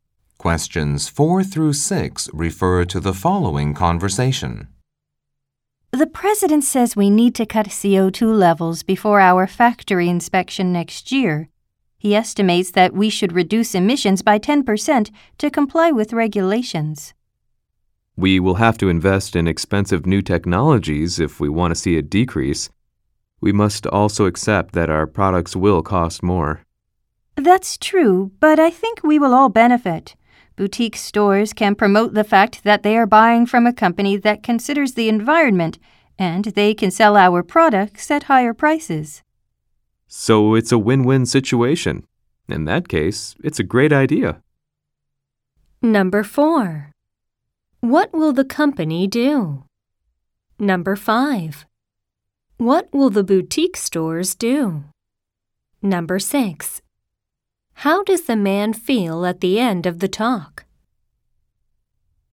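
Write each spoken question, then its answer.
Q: What will the company do?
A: Reduce its CO2 emissions by investing in new technologies

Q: What will the boutique stores do?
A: Promote the company's environmental approach and sell the products at higher prices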